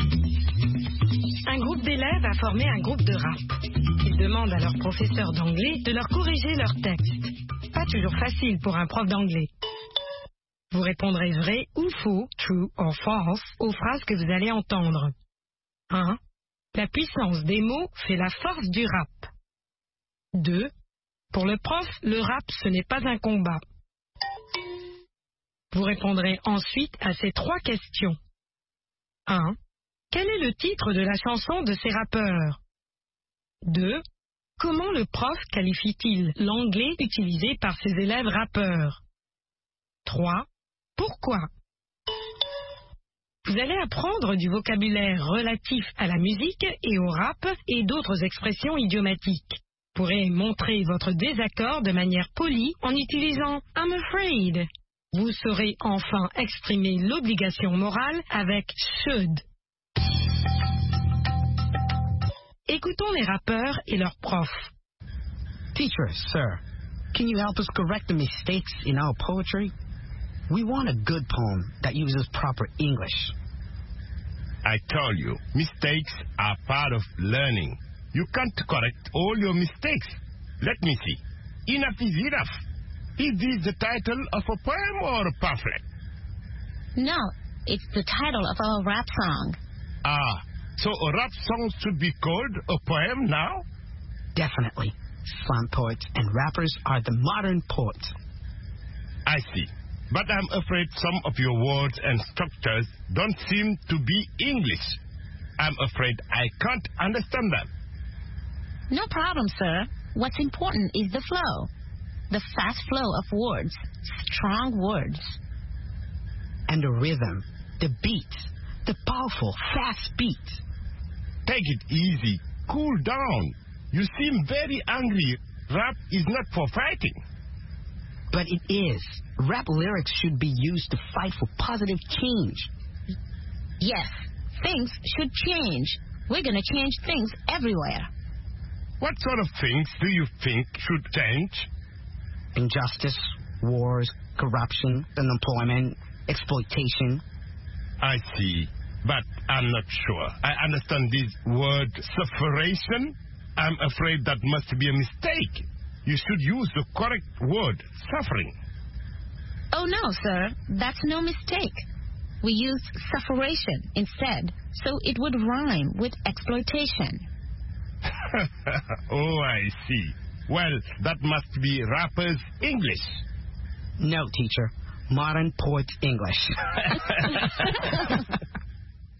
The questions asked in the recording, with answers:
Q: La puissance des mots fait la force du rap.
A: L'énoncé 1 est vrai.

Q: Pour le prof, le rap ce n'est pas un combat.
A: L'énoncé 2 est vrai.

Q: Quel est le titre de la chanson de ces rappeurs?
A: Enough is enough.

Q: Comment le prof qualifie-t-il l'anglais utilisé par ses élèves rappeurs?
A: D'anglais de rappeur.